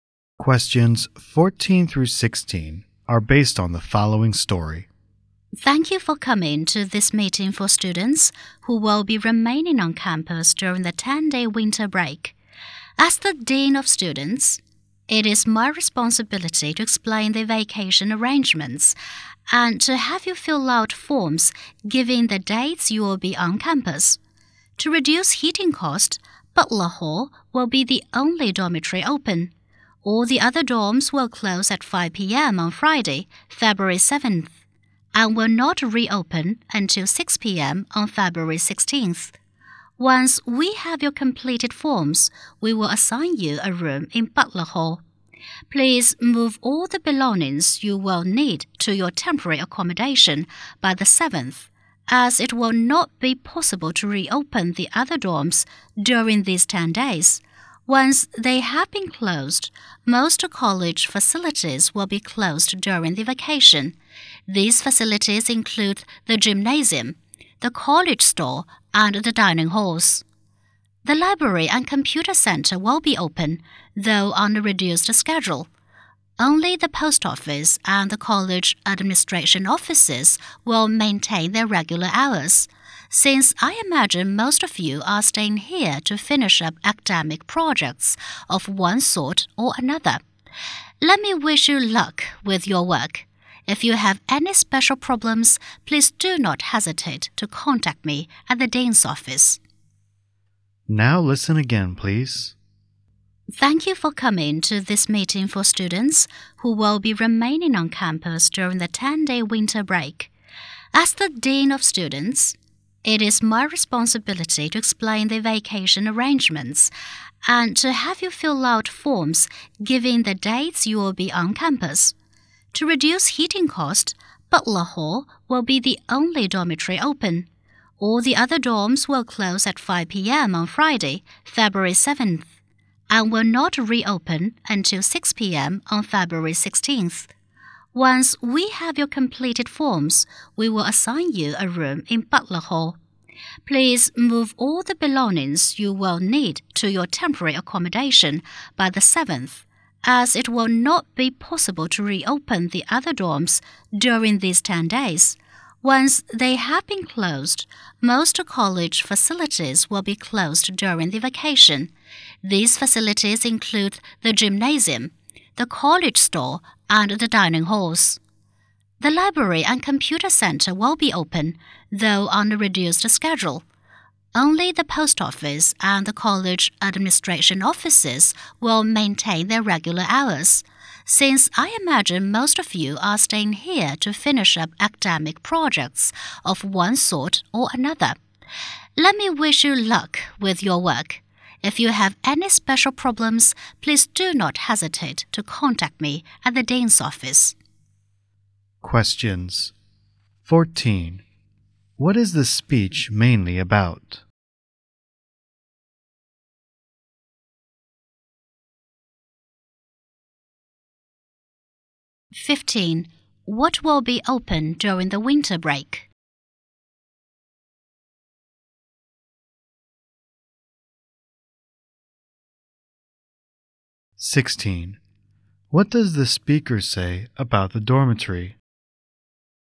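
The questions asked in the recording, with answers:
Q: What is the speech mainly about?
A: Arrangements for students staying on campus during the winter break

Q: What does the speaker say about the dormitory?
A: Only Butler Hall will be open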